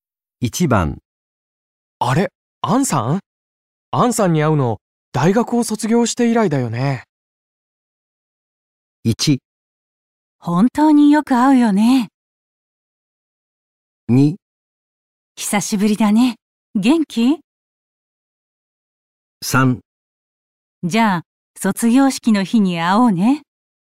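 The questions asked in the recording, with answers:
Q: あれ、アンさん?アンさんに会うの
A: 2: 久しぶりだね。元気?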